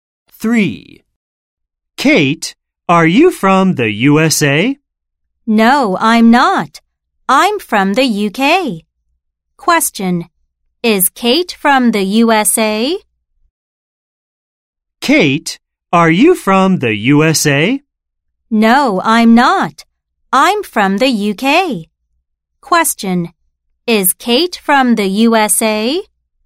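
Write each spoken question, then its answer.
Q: Question, is Kate from the USA?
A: No, she is from the UK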